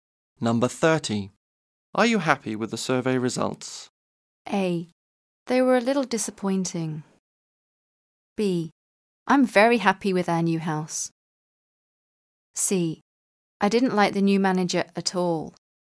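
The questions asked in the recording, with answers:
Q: Are you happy with the survey results?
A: A: They were a little disappointing.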